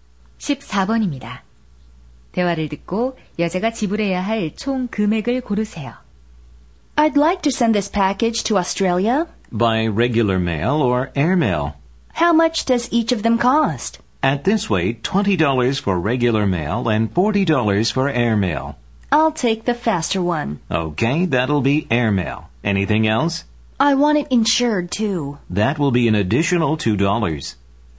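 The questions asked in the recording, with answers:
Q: 대화를 듣고 여자가 지불해야 할 총 금액을 고르세요.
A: 42달러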